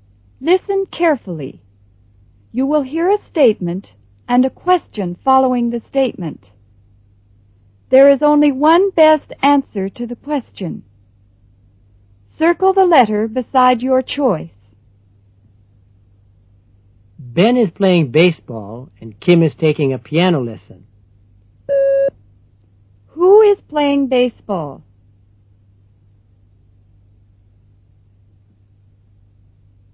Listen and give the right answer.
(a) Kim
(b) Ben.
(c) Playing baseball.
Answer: (b) Ben.

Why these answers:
Ben is playing baseball and Kim is taking a piano lesson. Who is playing baseball?

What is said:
Exercises:
A.Sentence Structure
Directions: Listen carefully. You will hear a statement and a question following the statement. There is only one best answer to the question. Circle the letter beside your choice.